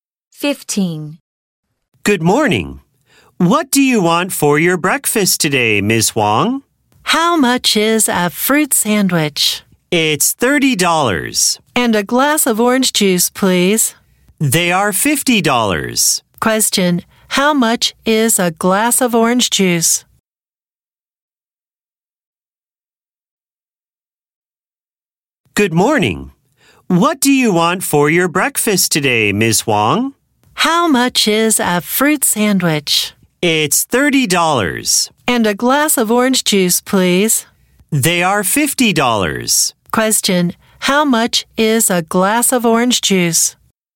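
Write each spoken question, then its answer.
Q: Question, how much is a glass of orange juice?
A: $20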